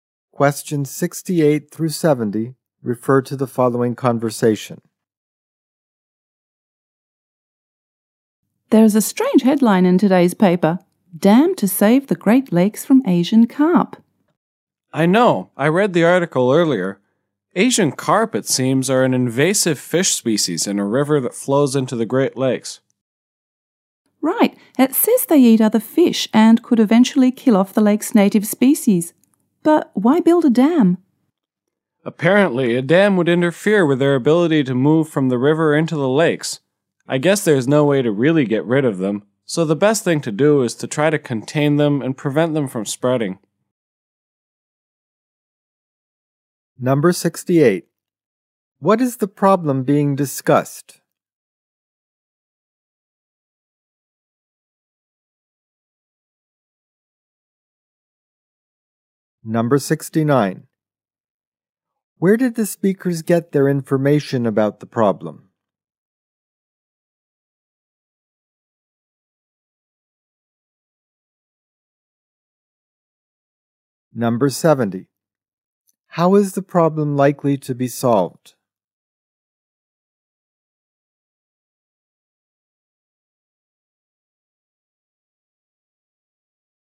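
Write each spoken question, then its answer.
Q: What is the problem being discussed?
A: Invasive Asian carp threatening the Great Lakes' native fish.

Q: Where did the speakers get their information about the problem?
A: From a newspaper article.

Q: How is the problem likely to be solved?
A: By building a dam to contain the carp.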